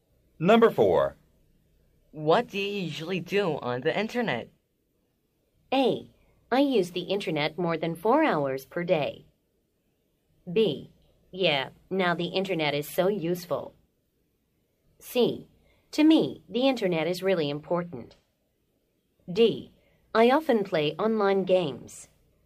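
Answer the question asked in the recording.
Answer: D: I often play online games.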